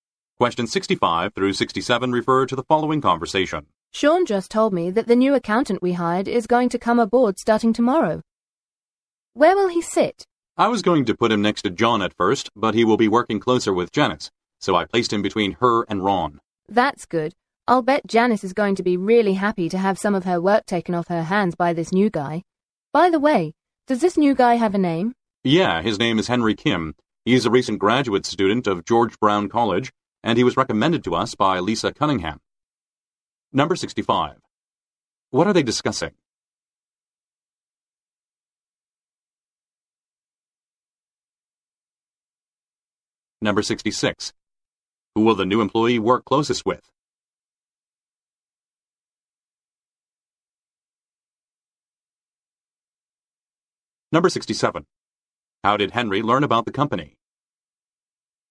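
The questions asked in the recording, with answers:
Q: What are they discussing?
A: A new accountant who starts tomorrow

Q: Who will the new employee work closest with?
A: Janice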